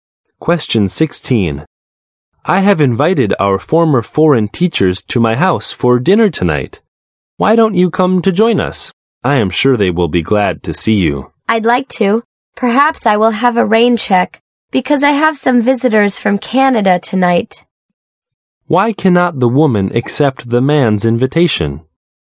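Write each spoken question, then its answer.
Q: Why cannot the woman accept the man's invitation?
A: She has visitors from Canada tonight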